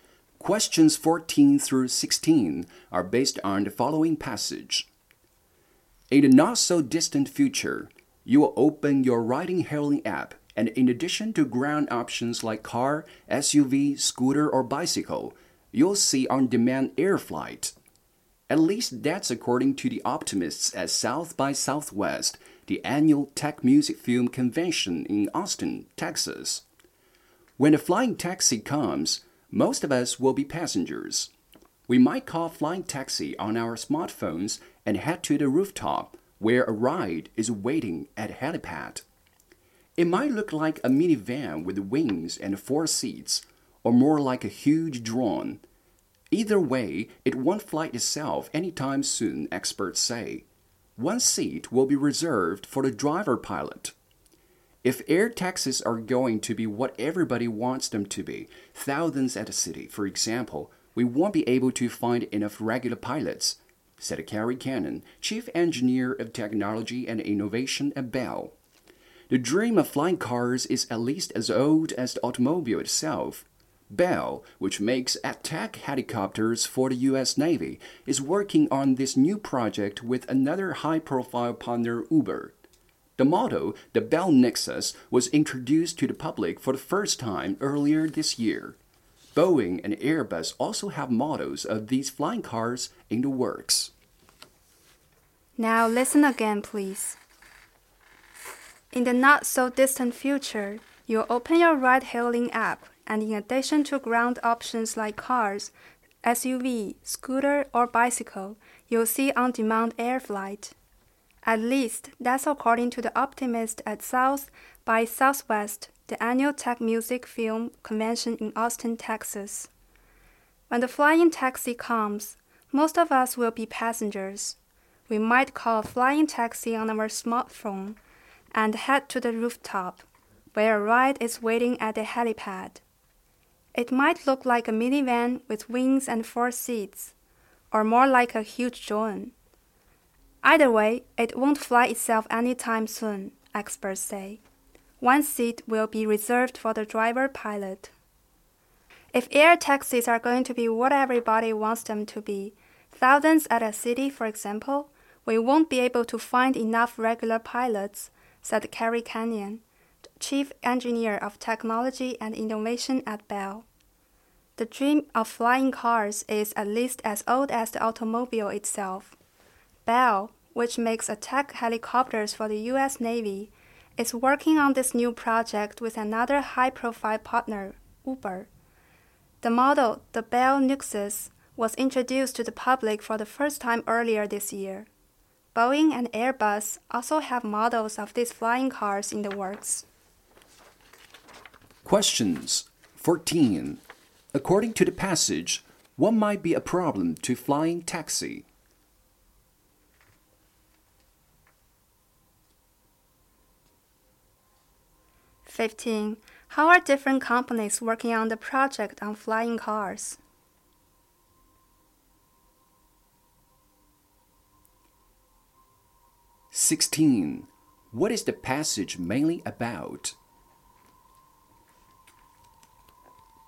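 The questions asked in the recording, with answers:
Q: According to the passage, what might be a problem to flying taxi?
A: Not enough pilots

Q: What is the passage mainly about?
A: Flying taxis of the future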